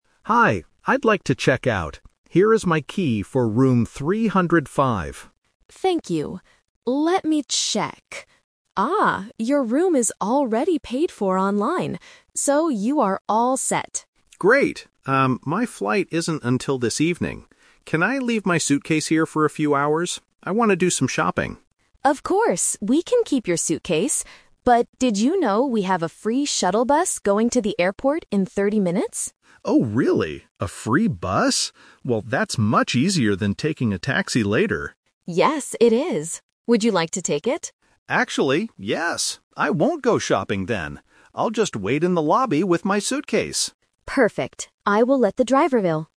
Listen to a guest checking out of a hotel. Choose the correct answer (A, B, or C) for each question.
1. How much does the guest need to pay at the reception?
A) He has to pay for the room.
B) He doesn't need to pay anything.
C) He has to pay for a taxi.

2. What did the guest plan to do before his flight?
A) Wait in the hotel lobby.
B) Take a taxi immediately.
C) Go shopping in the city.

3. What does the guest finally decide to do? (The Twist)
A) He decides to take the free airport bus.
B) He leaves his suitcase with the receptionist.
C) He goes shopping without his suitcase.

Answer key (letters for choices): 1B, 2C, 3A

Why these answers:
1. The receptionist clearly says, "your room is already paid for online. So, you are all set." This means he owes no money. Trap: Option A is what normally happens at check-out, but not in this specific case. Option C is a trap because the word "taxi" is mentioned later, but he doesn't pay for one.
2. Option A is what he does in the end, not his first plan. Option B is incorrect because he wanted to take a taxi "later", not immediately.
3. This is the Twist. The guest hears about the free bus and changes his mind. He says, "Actually, yes! I won't go shopping then. I'll just wait in the lobby..." to take the bus. Trap: Option B and Option C are his initial plans, but he cancels them ("I won't go shopping then") because taking the free bus is easier.

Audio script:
Guest: Hi, I'd like to check out. Here is my key for room 305.
Receptionist: Thank you. Let me check... Ah, your room is already paid for online. So, you are all set.
Guest: Great. Um, my flight isn't until this evening. Can I leave my suitcase here for a few hours? I want to do some shopping.
Receptionist: Of course, we can keep your suitcase. But, did you know we have a free shuttle bus going to the airport in 30 minutes?
Guest: Oh, really? A free bus? Well, that's much easier than taking a taxi later.
Receptionist: Yes, it is. Would you like to take it?
Guest: Actually, yes! I won't go shopping then.